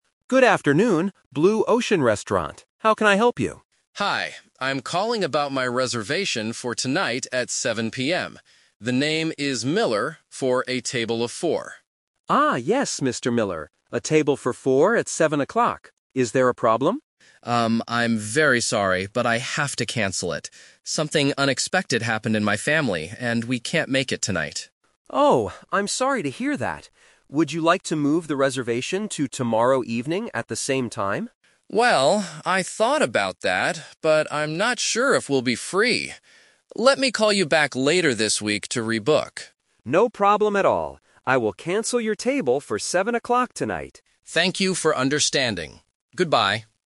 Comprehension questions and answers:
Listen to the conversation and choose the correct answer (A, B, or C).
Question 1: What time was the original reservation?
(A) 4:00 PM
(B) 7:00 PM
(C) 9:00 PM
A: 7:00 PM

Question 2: Why did the customer cancel the table?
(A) He is busy with work.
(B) He has a family emergency.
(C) He found a different restaurant.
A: He has a family emergency.

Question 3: What did the customer decide to do at the end?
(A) Move the booking to tomorrow.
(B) Come to the restaurant later tonight.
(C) Call back another time to book again.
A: Call back another time to book again.

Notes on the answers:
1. The customer says, "I'm calling about my reservation for tonight at 7:00 PM." Option (A) is a trap because the customer mentions a "table of four" (số 4). Option (C) is not mentioned.
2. The customer mentions "Something unexpected happened in my family." This means a family emergency. Option (A) and (C) are plausible reasons but are not mentioned in the audio.
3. The customer says, "Let me call you back later this week to rebook." Option (A) is a trap because the manager suggested it, but the customer rejected it ("but I'm not sure..."). Option (B) is incorrect because he cancelled the table.

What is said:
Manager: Good afternoon, Blue Ocean Restaurant. How can I help you?
Customer: Hi. I'm calling about my reservation for tonight at 7:00 PM. The name is Miller, for a table of four.
Manager: Ah, yes, Mr. Miller. A table for four at 7:00. Is there a problem?
Customer: Um, I'm very sorry, but I have to cancel it. Something unexpected happened in my family, and we can't make it tonight.
Manager: Oh, I'm sorry to hear that. Would you like to move the reservation to tomorrow evening at the same time?
Customer: Well, I thought about that, but I'm not sure if we'll be free. Let me call you back later this week to rebook.
Manager: No problem at all. I will cancel your table for 7:00 tonight.

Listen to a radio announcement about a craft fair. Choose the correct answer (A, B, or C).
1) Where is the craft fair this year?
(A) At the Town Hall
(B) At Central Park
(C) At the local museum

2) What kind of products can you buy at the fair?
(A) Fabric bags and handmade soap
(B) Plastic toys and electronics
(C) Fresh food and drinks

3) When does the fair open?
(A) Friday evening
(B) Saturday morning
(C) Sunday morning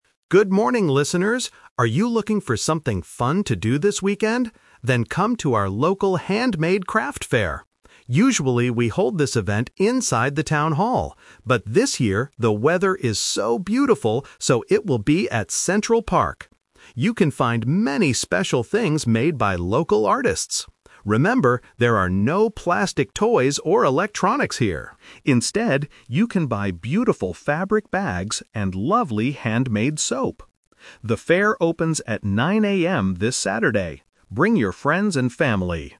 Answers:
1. At Central Park
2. Fabric bags and handmade soap
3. Saturday morning

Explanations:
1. The host clearly states the new location: "...this year, the weather is so beautiful, so it will be at Central Park!" Trap (The Twist): Option A (At the Town Hall) is a trap. The host mentions the Town Hall, but says that is where they usually hold the event, not this year. Option C is not mentioned.
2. The host explicitly says: "Instead, you can buy beautiful fabric bags and lovely handmade soap." Trap: Option B (Plastic toys and electronics) is a distractor. The host mentions them but specifically says "there are no plastic toys or electronics here." Option C is a plausible guess for a fair, but it is not mentioned.
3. The host announces the time: "The fair opens at 9:00 AM this Saturday." (9:00 AM is in the morning). Trap: Option A and C are distractors. They use different days or times of day that are not in the announcement.

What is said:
Radio Host: Good morning, listeners! Are you looking for something fun to do this weekend? Then come to our local Handmade Craft Fair. Usually, we hold this event inside the Town Hall. But this year, the weather is so beautiful, so it will be at Central Park! You can find many special things made by local artists. Remember, there are no plastic toys or electronics here. Instead, you can buy beautiful fabric bags and lovely handmade soap. Bring your friends and family!

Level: A2

